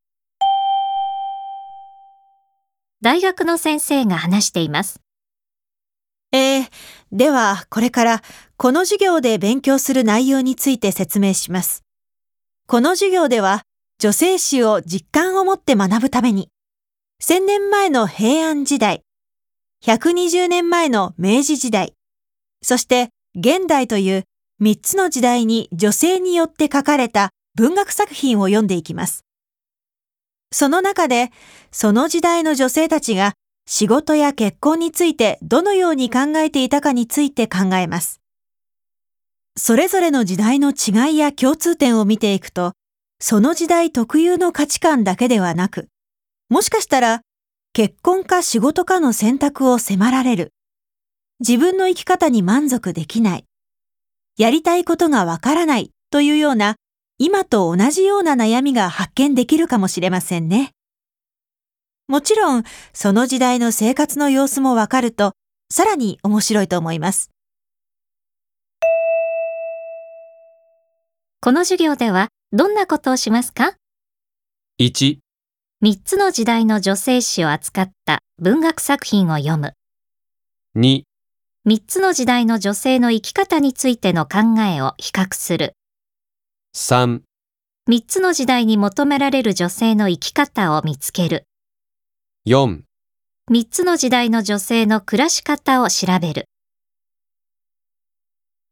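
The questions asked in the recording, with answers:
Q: この授業では、どんなことをしますか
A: 2: 3つの時代の女性の生き方についての考えを比較する。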